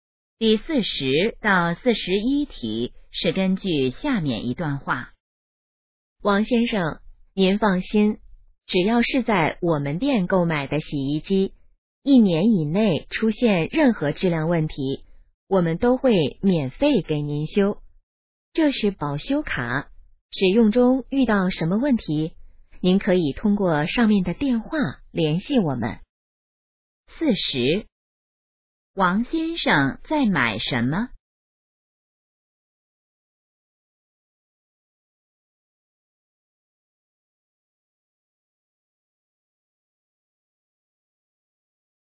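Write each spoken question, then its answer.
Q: 王先生在买什么?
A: 洗衣机

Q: 联系电话写在哪儿?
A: 保修卡上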